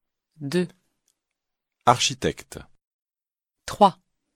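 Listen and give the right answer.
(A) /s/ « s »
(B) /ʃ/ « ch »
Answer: (B) /ʃ/ « ch »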